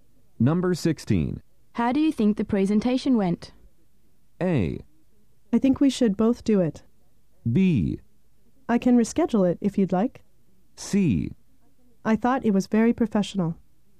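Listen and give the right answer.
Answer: C: I thought it was very professional.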